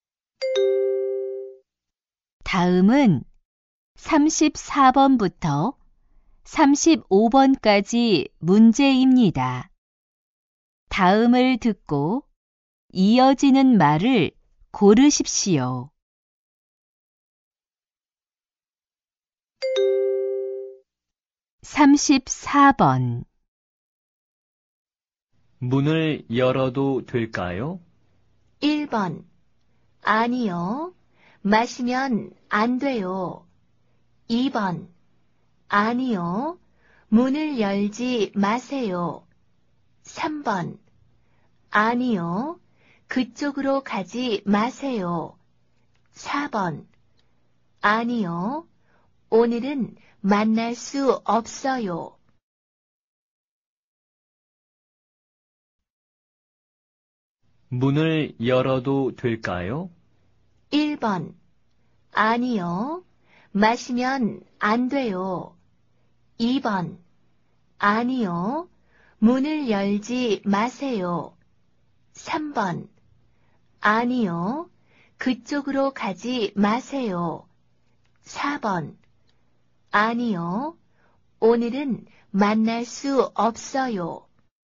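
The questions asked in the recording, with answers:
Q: 문을 열어도 될까요?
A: 2: 아니요. 문을 열지 마세요.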